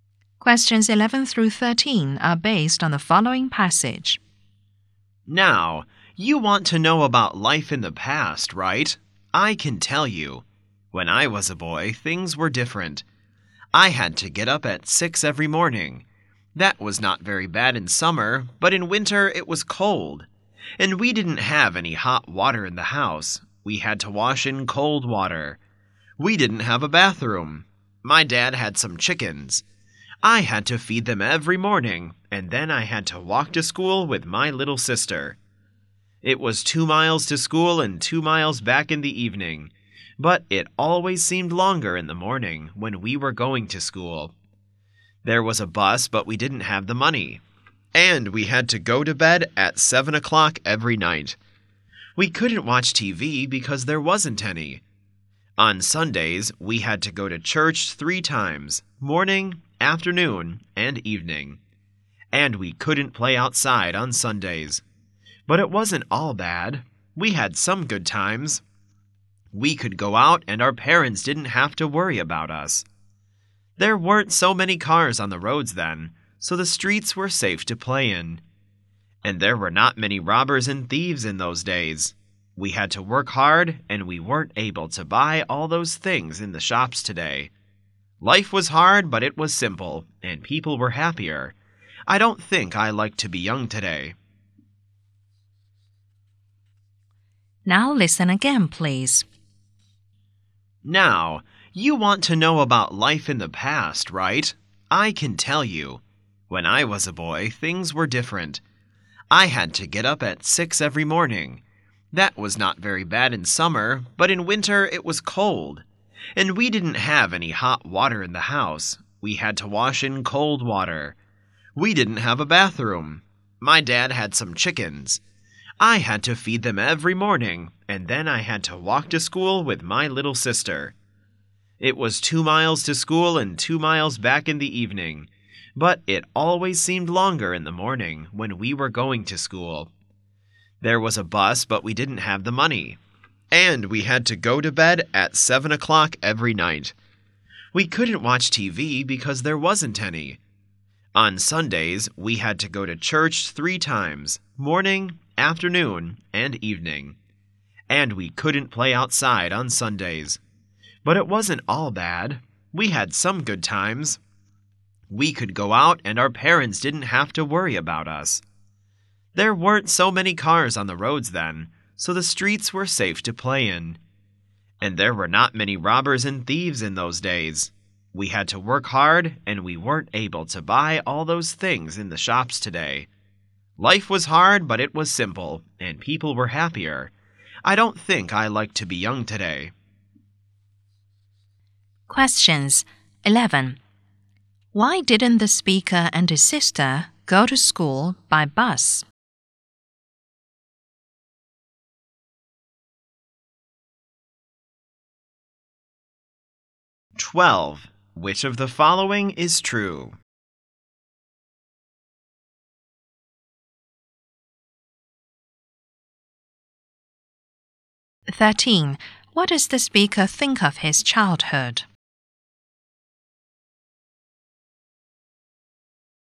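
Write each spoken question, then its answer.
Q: Why didn't the speaker and his sister go to school by bus?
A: They didn't have the money

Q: What does the speaker think of his childhood?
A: Life was hard but simple, and people were happier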